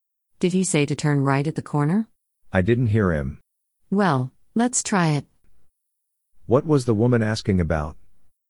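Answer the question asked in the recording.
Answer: Whether to turn right at the corner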